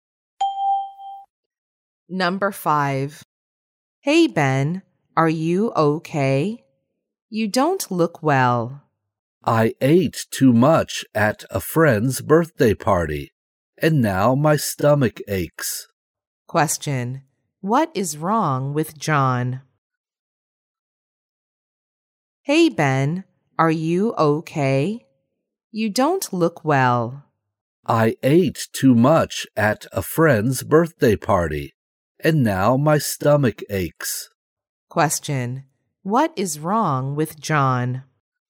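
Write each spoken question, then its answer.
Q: What is wrong with John?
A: He has a stomachache from eating too much at a birthday party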